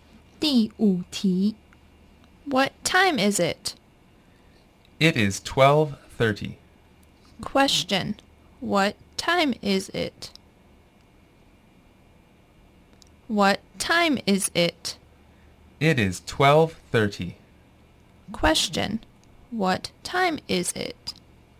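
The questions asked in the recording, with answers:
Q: Question, what time is it?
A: 12:30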